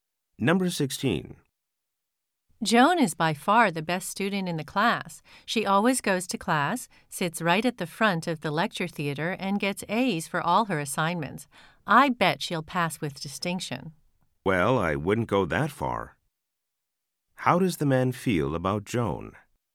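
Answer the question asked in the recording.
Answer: He doubts she will pass with distinction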